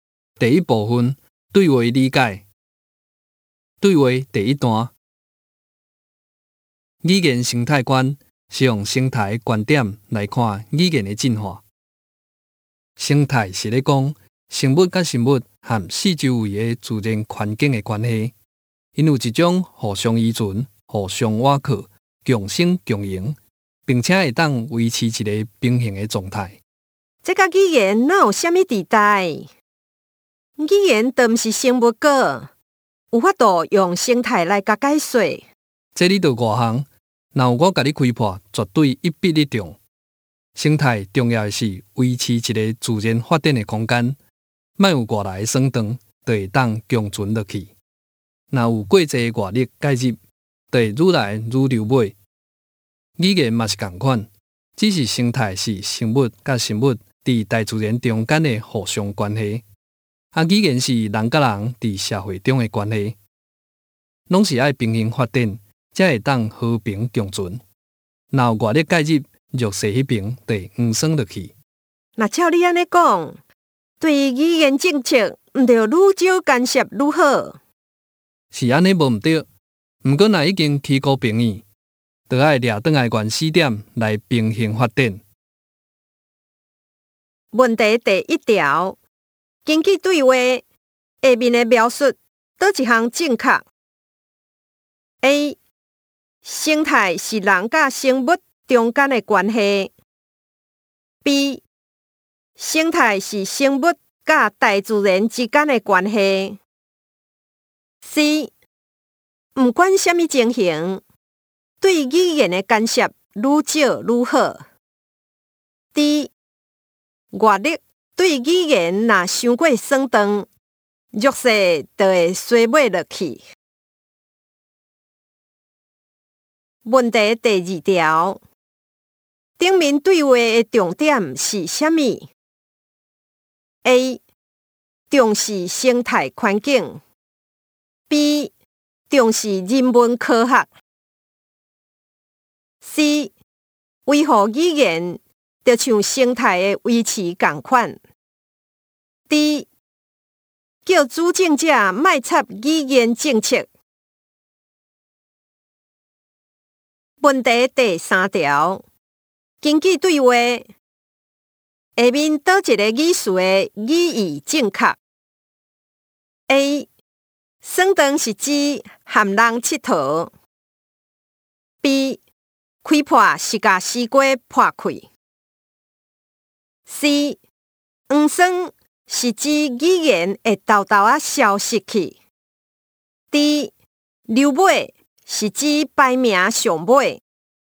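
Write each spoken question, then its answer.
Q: 根据对话下面的描述,倒一项正确 ?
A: D: 外力对语言若伤过酸长,弱势就会衰落落去。

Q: 顶面对话的重点是啥物 ?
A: C: 维护语言,就像生态的维持共款。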